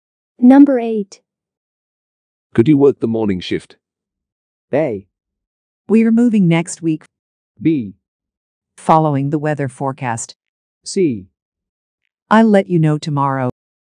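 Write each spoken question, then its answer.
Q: Could you work the morning shift?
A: C: I'll let you know tomorrow.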